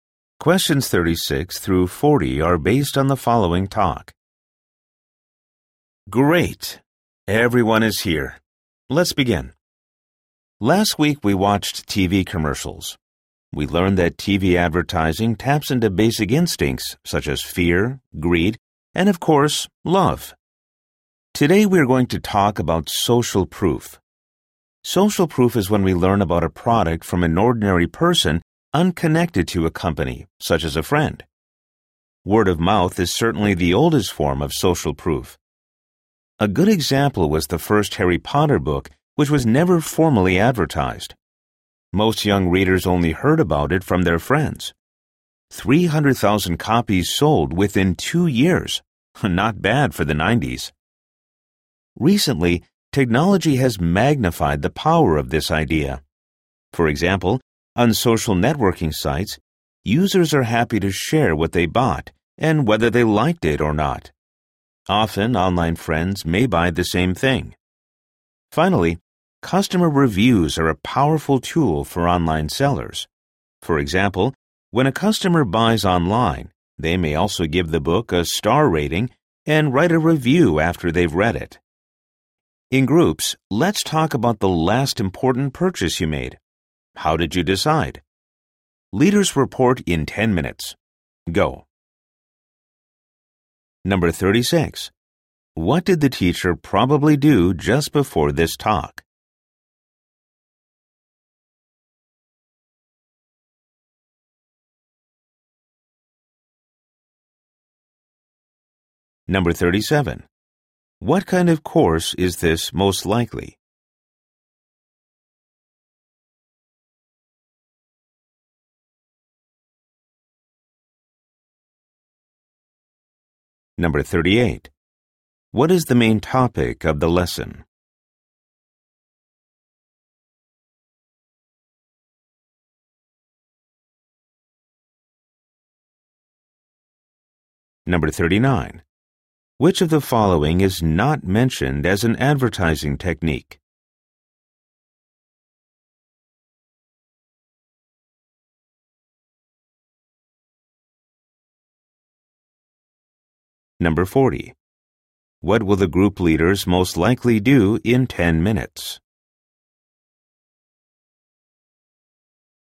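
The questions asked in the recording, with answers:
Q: What kind of course is this most likely?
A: A marketing or advertising course

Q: What is the main topic of the lesson?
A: Social proof

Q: What will the group leaders most likely do in 10 minutes?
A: Report on their group's discussion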